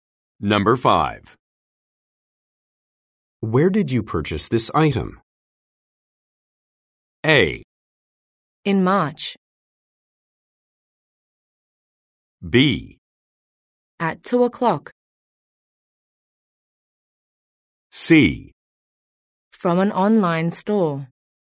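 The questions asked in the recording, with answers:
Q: Where did you purchase this item?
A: C: From an online store.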